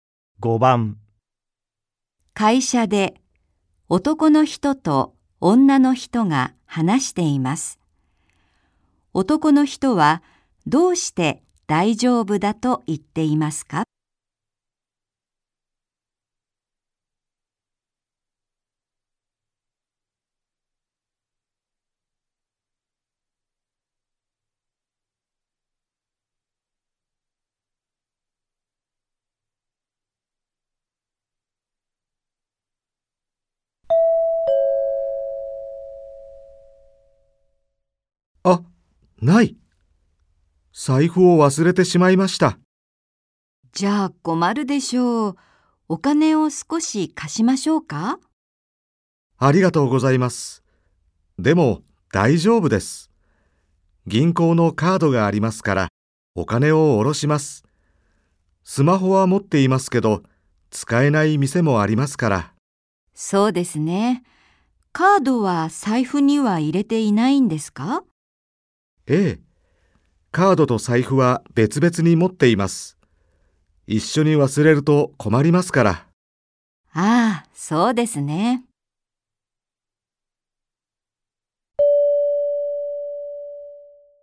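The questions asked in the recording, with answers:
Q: 男の人はどうして大丈夫だと言っていますか?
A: 銀行のカードがあってお金を下ろせるから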